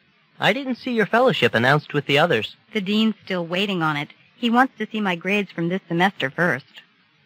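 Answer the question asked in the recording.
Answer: Her fellowship hasn't been decided yet; the dean wants to see her grades first.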